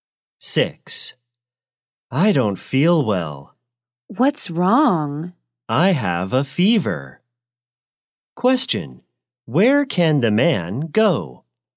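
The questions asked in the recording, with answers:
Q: Where can the man go?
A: To the hospital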